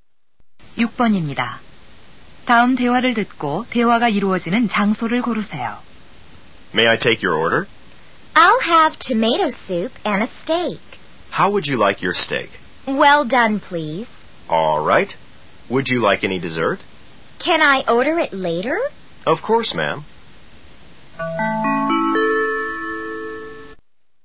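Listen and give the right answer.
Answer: 식당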